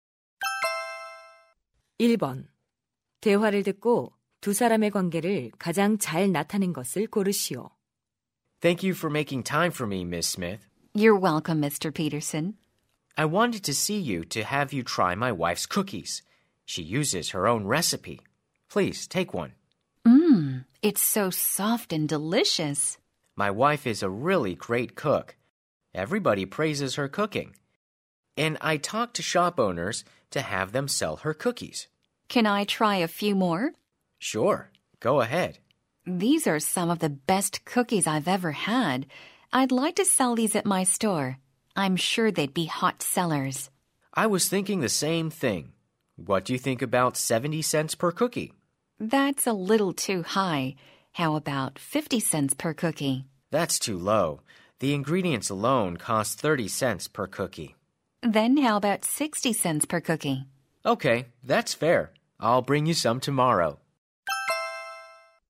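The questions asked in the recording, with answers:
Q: 대화를 듣고 두 사람의 관계를 가장 잘 나타낸 것을 고르시오.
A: 가게 주인 - 쿠키 판매자(요리사의 남편)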